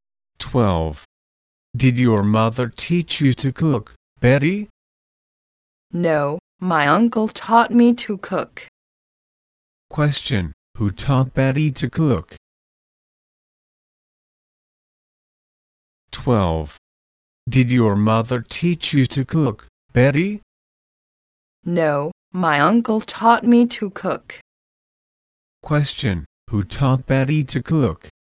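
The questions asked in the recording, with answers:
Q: who taught Betty to cook?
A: Her uncle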